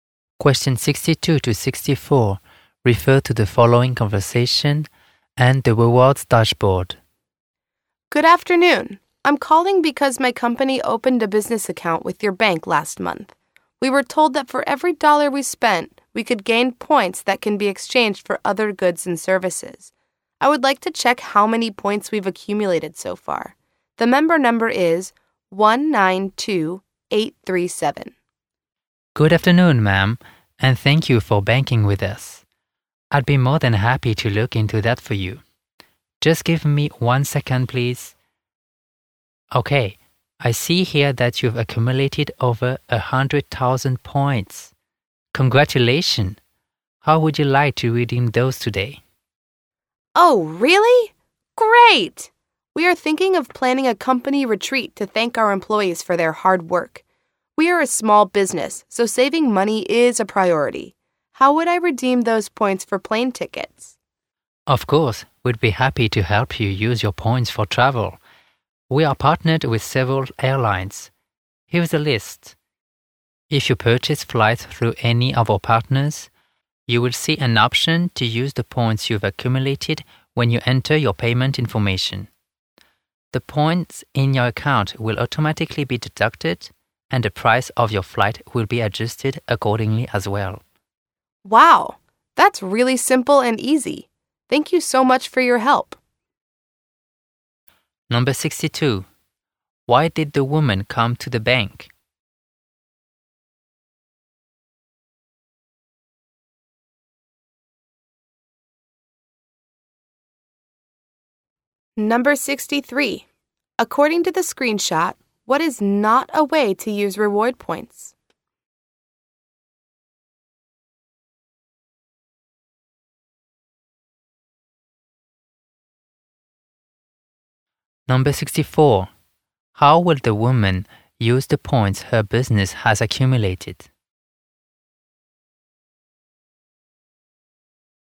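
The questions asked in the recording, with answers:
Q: Why did the woman come to the bank?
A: To check her company's accumulated reward points

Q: How will the woman use the points her business has accumulated?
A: For plane tickets for a company retreat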